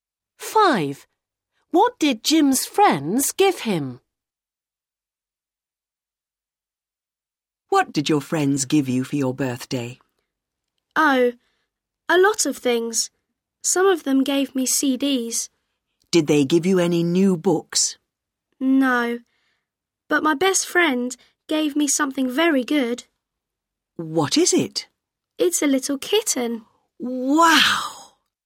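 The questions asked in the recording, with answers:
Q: What did Jim's friends give him?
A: a kitten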